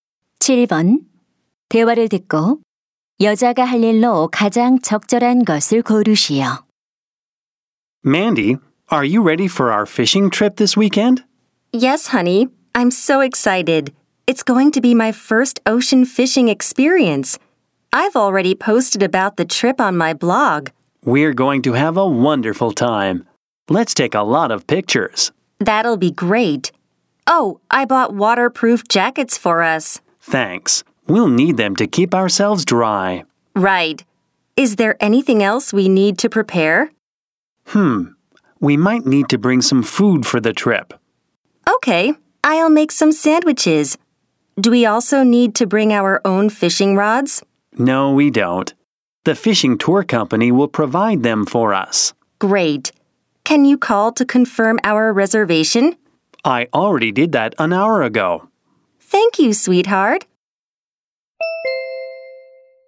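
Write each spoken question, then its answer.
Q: 대화를 듣고 여자가 할 일로 가장 적절한 것을 고르시오.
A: 샌드위치 만들기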